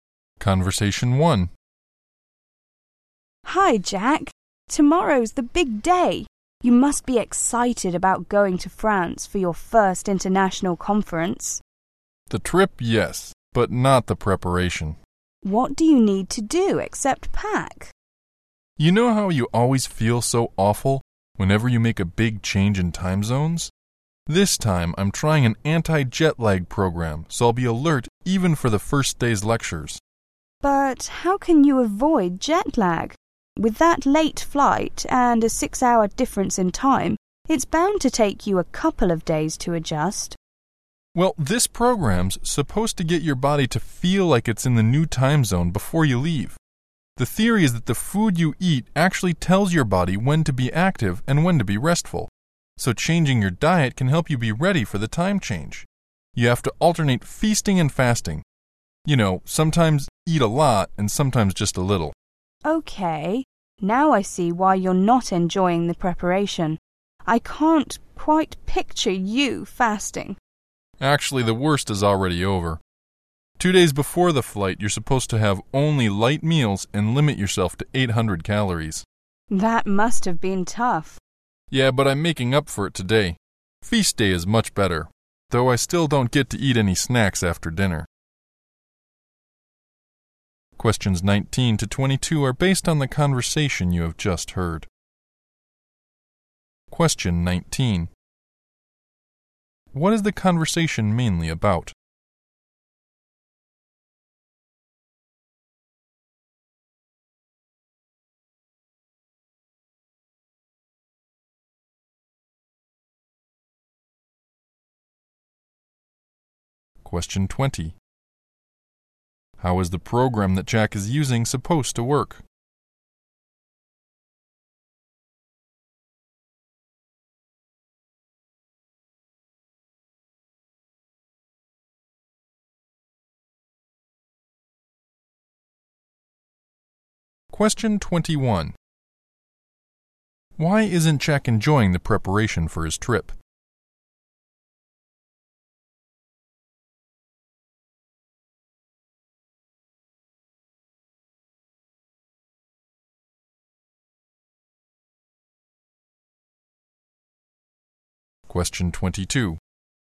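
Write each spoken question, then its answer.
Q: What is the conversation mainly about?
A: Jack's anti-jet lag program before his trip

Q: How is the program that Jack is using supposed to work?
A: Changing diet, alternating feasting and fasting, so the body adjusts to the new time zone

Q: Why isn't Jack enjoying the preparation for his trip?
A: He has to fast and limit what he eats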